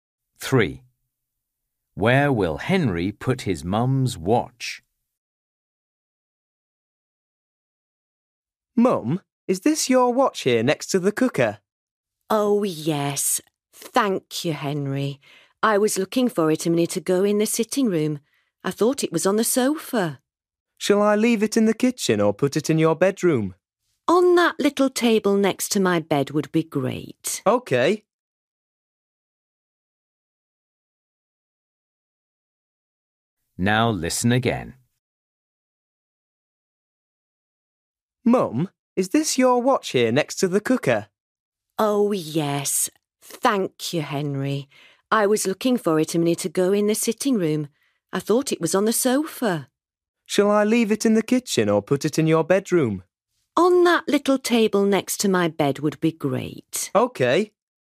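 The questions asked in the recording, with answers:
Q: Where will Henry put his mum's watch?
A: On the little table next to her bed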